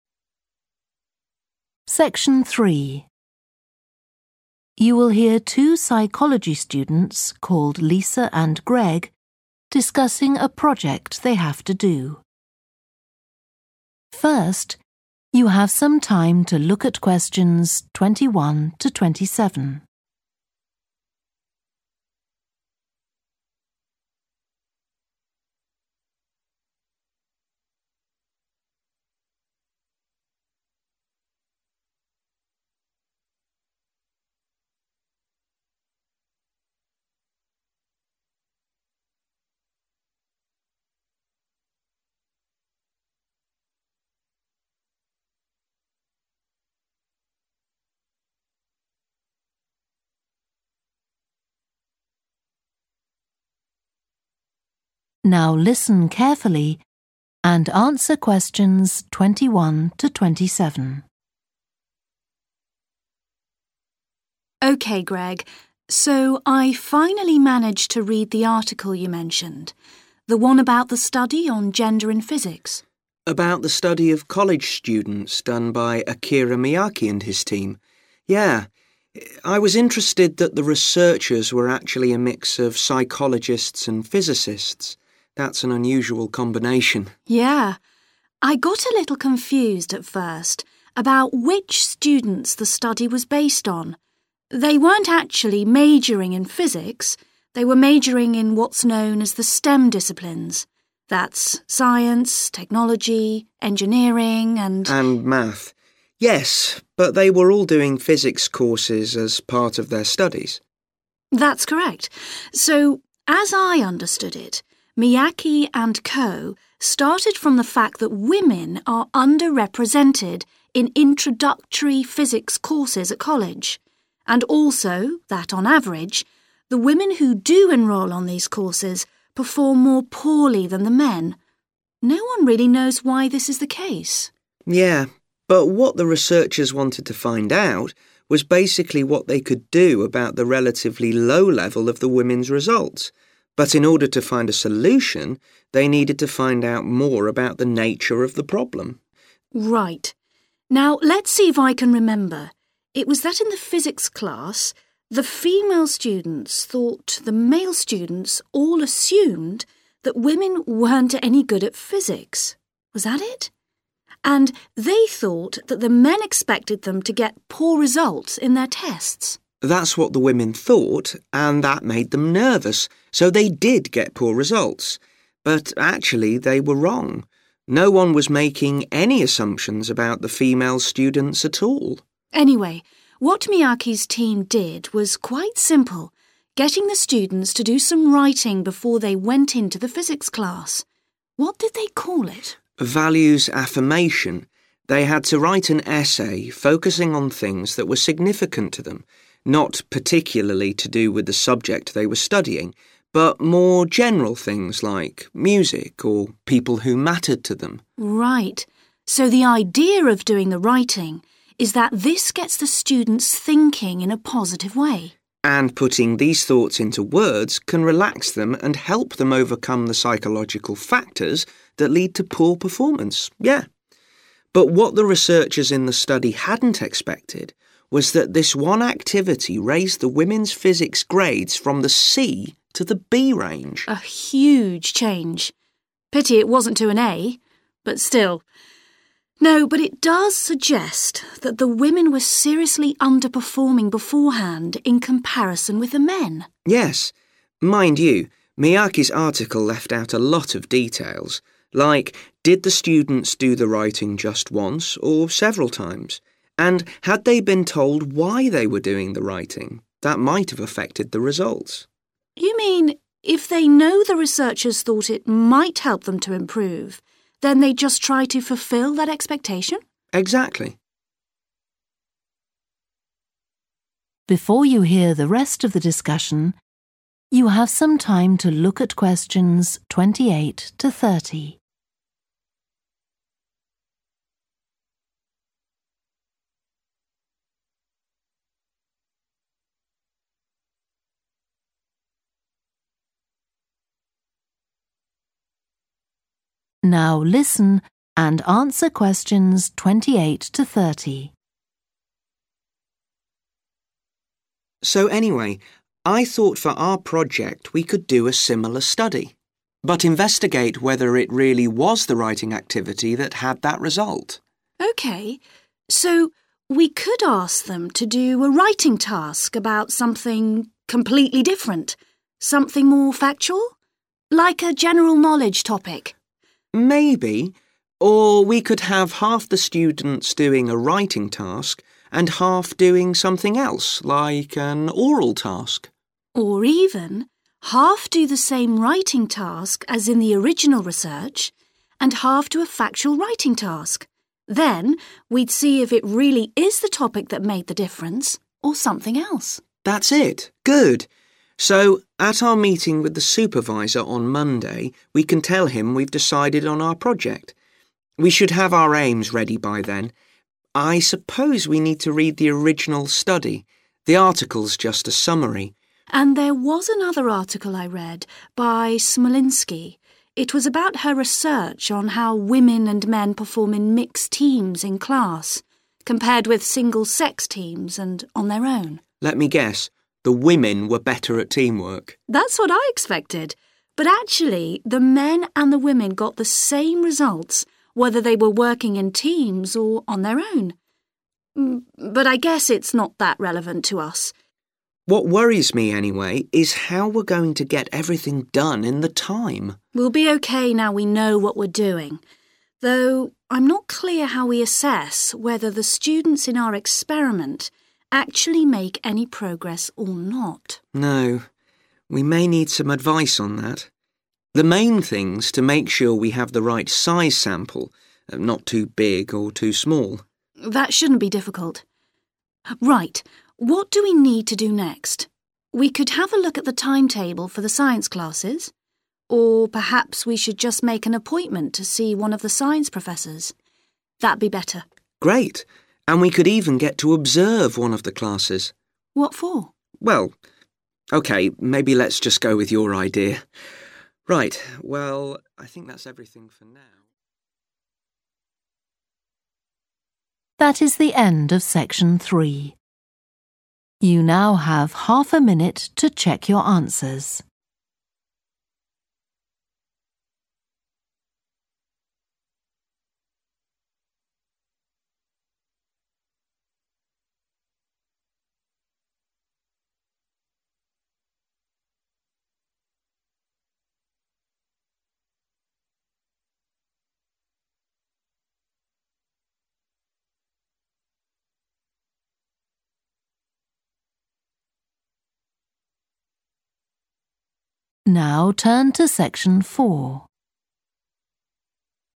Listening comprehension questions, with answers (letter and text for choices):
Choose the correct letter, A, B or C.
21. The students in Akira Miyake's study were all majoring in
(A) physics.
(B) psychology or physics.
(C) science, technology, engineering or mathematics.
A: (C) science, technology, engineering or mathematics.

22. The aim of Miyake's study was to investigate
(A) what kind of women choose to study physics.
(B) a way of improving women's performance in physics.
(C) whether fewer women than men study physics at college.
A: (B) a way of improving women's performance in physics.

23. The female physics students were wrong to believe that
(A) the teachers marked them in an unfair way.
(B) the male students expected them to do badly.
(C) their test results were lower than the male students'.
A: (B) the male students expected them to do badly.

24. Miyake's team asked the students to write about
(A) what they enjoyed about studying physics.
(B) the successful experiences of other people.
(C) something that was important to them personally.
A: (C) something that was important to them personally.

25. What was the aim of the writing exercise done by the subjects?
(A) to reduce stress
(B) to strengthen verbal ability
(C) to encourage logical thinking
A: (A) to reduce stress

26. What surprised the researchers about the study?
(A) how few students managed to get A grades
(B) the positive impact it had on physics results for women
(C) the difference between male and female performance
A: (B) the positive impact it had on physics results for women

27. Greg and Lisa think Miyake's results could have been affected by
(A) the length of the writing task.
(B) the number of students who took part.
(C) the information the students were given.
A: (C) the information the students were given.

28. Greg and Lisa decide that in their own project, they will compare the effects of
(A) two different writing tasks.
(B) a writing task with an oral task.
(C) two different oral tasks.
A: (A) two different writing tasks.

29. The main finding of Smolinsky's research was that class teamwork activities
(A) were most effective when done by all-women groups.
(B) had no effect on the performance of men or women.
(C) improved the results of men more than of women.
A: (B) had no effect on the performance of men or women.

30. What will Lisa and Greg do next?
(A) talk to a professor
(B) observe a science class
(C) look at the science timetable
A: (A) talk to a professor

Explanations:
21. The correct answer is 'C' because the students mentioned in the transcript were studying a range of subjects within the STEM disciplines, not just physics.
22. The correct answer is 'B' because the researchers were focused on addressing the relatively low level of women's results in physics, indicating a goal to improve their performance rather than studying the selection patterns of women in physics or comparing gender ratios in college physics studies.
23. The correct answer is B because the excerpt clarifies that no assumptions were being made about the female students by the male students regarding their performance in physics. Therefore, the female students' belief that the male students expected them to do badly was incorrect.
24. The correct answer is C because the excerpt clearly states that students were required to write about things that held personal significance to them, not necessarily related to the subject they were studying. This directly corresponds to option C, which emphasizes personal importance.
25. The correct answer is A because the excerpt talks about how putting thoughts into words can help individuals relax and overcome psychological factors affecting their performance. This aligns with the idea of reducing stress, making choice A the most suitable answer.
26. The correct answer (B) aligns with the information in the excerpt, which highlights that the unexpected outcome of the activity was an improvement in women's physics grades. This surprising positive impact on the grades of women supports why option B, mentioning the positive effect on women's physics results, is the correct choice.
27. The correct answer is C because the excerpt implies that providing information to the students about the purpose of the writing task could have influenced their responses. This aligns with option C, which focuses on the information given to the students as a potential factor affecting the results.
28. The correct answer is A because the excerpt confirms that Greg and Lisa are indeed planning to compare the effects of two different writing tasks, one being the same as in the original research and the other being a different factual writing task.
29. The correct answer is 'B' because the excerpt clearly mentions that men and women achieved similar results whether they worked in teams or on their own. This aligns with the statement in answer choice 'B' that teamwork activities had no effect on their performance.
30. The correct answer is A because in the excerpt, one option discussed is to make an appointment to see a science professor, which aligns with the choice A 'talk to a professor'.

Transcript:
LISA: OK, Greg, so I finally managed to read the article you mentioned – the one about the study on gender in physics.
GREG: About the study of college students done by Akira Miyake and his team? Yeah. I was interested that the researchers were actually a mix of psychologists and physicists. That's an unusual combination.
LISA: Yeah. I got a little confused at first about which students the study was based on. They weren't actually majoring in physics – they were majoring in what's known as the STEM disciplines. That's science, technology, engineering and ...
and math. Yes, but they were all doing physics courses as part of their studies.
LISA: That's correct. So as I understood it, Miyake and co started from the fact that women are underrepresented in introductory physics courses at college, and also that on average, the women who do enrol on these courses perform more poorly than the men. No one really knows why this is the case.
GREG: Yeah. But what the researchers wanted to find out was basically what they could do about the relatively low level of the women's results. But in order to find a solution they needed to find out more about the nature of the problem.
LISA: Right – now let's see if I can remember ... it was that in the physics class, the female students thought the male students all assumed that women weren't any good at physics ... was that it? And they thought that the men expected them to get poor results in their tests.
GREG: That's what the women thought, and that made them nervous, so they did get poor results. But actually they were wrong ... No one was making any assumption about the female students at all.
LISA: Anyway, what Miyake's team did was quite simple – getting the students to do some writing before they went into the physics class. What did they call it?
GREG: Values-affirmation – they had to write an essay focusing on things that were significant to them, not particularly to do with the subject they were studying, but more general things like music or people who mattered to them.
LISA: Right. So the idea of doing the writing is that this gets the students thinking in a positive way.
GREG: And putting these thoughts into words can relax them and help them overcome the psychological factors that lead to poor performance. Yeah. But what the researchers in the study hadn't expected was that this one activity raised the women's physics grades from the C to the B range.
LISA: A huge change. Pity it wasn't to an A, but still! No, but it does suggest that the women were seriously underperforming beforehand, in comparison with the men.
GREG: Yes. Mind you, Miyake's article left out a lot of details. Like, did the students to the writing just once, or several times? And had they been told why they were doing the writing? That might have affected the results.
LISA: You mean, if they know the researchers thought it might help them to improve, then they'd just try to fulfil that expectation?
GREG: Exactly.
GREG: So anyway, I thought for our project we could do a similar study, but investigate whether it really was the writing activity that had that result.
LISA: OK. So we could ask them to do a writing task about something completely different ... something more factual? Like a general knowledge topic.
GREG: Maybe ... or we could have half the students doing a writing task and half doing something else, like an oral task.
LISA: Or even, half do the same writing task as in the original research and half do a factual writing task. Then we'd see if it really is the topic that made the difference, or something else.
GREG: That's it. Good. So at our meeting with the supervisor on Monday we can tell him we've decided on our project. We should have our aims ready by then. I suppose we need to read the original study – the article's just a summary.
LISA: And these was another article I read, by Smolinsky. It was about her research on how women and men perform in mixed teams in class, compared with single-sex teams and on their own.
GREG: Let me guess ... the women were better at teamwork.
LISA: That's what I expected, but actually the men and the women got the same results whether they were working in teams or on their own. But I guess it's not that relevant to us.
GREG: What worries me anyway is how we're going to get everything done in the time.
LISA: We'll be OK now we know what we're doing. Though I'm not clear how we assess whether the students in our experiment actually make any progress or not ...
GREG: No. We may need some advice on that. The main thing's to make sure we have the right size sample, not too big or too small.
LISA: That shouldn't be difficult. Right, what do we need to do next? We could have a look at the timetable for the science classes ... or perhaps we should just make an appointment to see one of the science professors. That'd be better.
GREG: Great. And we could even get to observe one of the classes.
LISA: What for?
GREG: Well ... OK maybe let's just go with your idea. Right, well ...